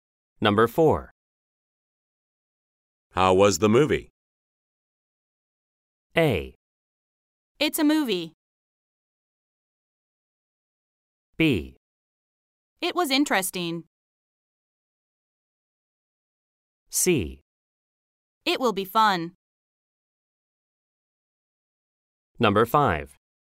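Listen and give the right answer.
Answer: B: It was interesting.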